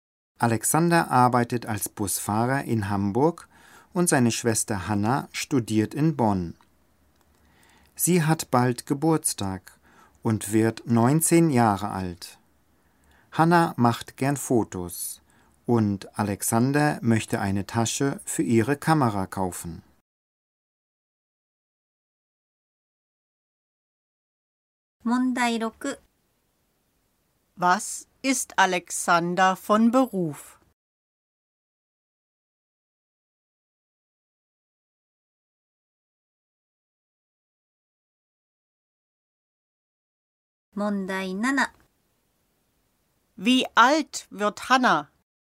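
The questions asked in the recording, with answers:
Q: Was ist Alexander von Beruf?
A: Busfahrer

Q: Wie alt wird Hanna?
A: 19 Jahre alt

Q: Was möchte Alexander kaufen?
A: Eine Tasche für ihre Kamera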